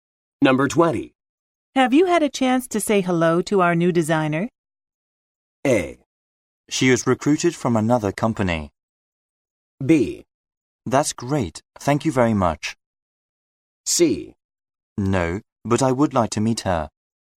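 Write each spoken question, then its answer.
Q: Have you had a chance to say hello to our new designer?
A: C: No, but I would like to meet her.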